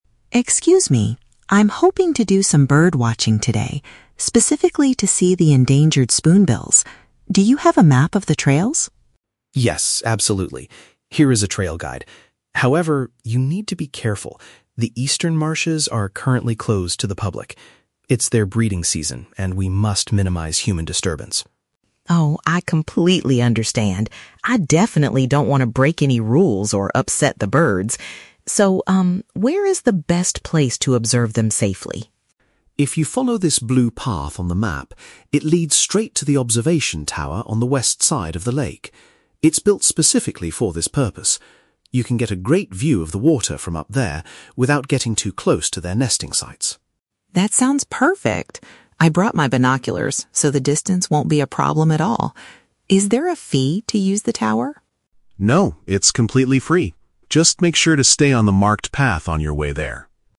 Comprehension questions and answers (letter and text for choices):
Listen to a conversation between a park visitor and a ranger. Choose the best answer (A, B, or C) for each question.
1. What is the visitor's main goal at the national park?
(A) To look at a rare species of water birds.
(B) To photograph the birds in the eastern marshes.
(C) To assist the park rangers in protecting the animals.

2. Why is a certain area of the park closed to visitors?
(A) Because the trails are too dangerous to walk on right now.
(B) Because the observation tower is located in that specific area.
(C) Because the birds are currently in their reproductive period.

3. How will the visitor view the wildlife?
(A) By using a special building designed for watching the animals.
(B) By renting a pair of binoculars from the park staff.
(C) By taking a guided boat ride across the west side of the lake.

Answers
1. (A) To look at a rare species of water birds.
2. (C) Because the birds are currently in their reproductive period.
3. (A) By using a special building designed for watching the animals.

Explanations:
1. The visitor says he wants to "do some bird watching... specifically to see the endangered spoonbills". Option A paraphrases this as looking at a "rare species of water birds."
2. The ranger explains that the area is closed because "It's their breeding season." Option C paraphrases this as being in their "reproductive period."
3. The ranger directs the visitor to an "observation tower" that is "built specifically for this purpose." Option A paraphrases this as a "special building designed for watching the animals."

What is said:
Visitor: Excuse me. I'm hoping to do some bird watching today, specifically to see the endangered spoonbills. Do you have a map of the trails?
Park Ranger: Yes, absolutely. Here is a trail guide. However, you need to be careful. The eastern marshes are currently closed to the public. It's their breeding season, and we must minimize human disturbance.
Visitor: Oh, I completely understand. I definitely don't want to break any rules or upset the birds. So, um, where is the best place to observe them safely?
Park Ranger: If you follow this blue path on the map, it leads straight to the observation tower on the west side of the lake. It's built specifically for this purpose. You can get a great view of the water from up there without getting too close to their nesting sites.
Visitor: That sounds perfect. I brought my binoculars, so the distance won't be a problem at all. Is there a fee to use the tower?
Park Ranger: No, it's completely free. Just make sure to stay on the marked path on your way there.